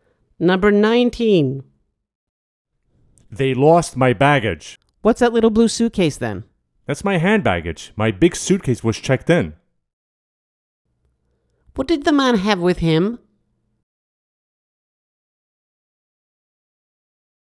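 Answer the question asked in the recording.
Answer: A small blue suitcase (hand baggage)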